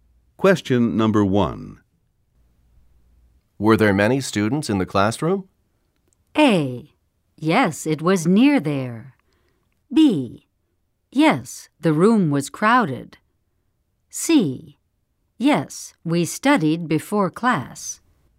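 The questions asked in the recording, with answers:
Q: Were there many students in the classroom?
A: B: Yes, the room was crowded.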